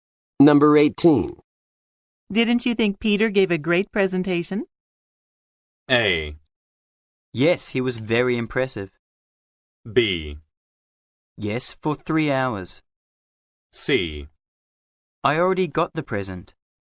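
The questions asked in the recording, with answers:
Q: Didn't you think Peter gave a great presentation?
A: A: Yes, he was very impressive.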